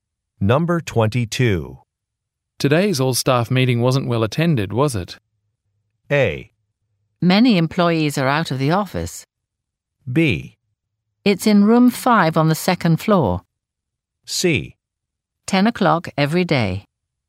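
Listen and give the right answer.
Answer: A: Many employees are out of the office.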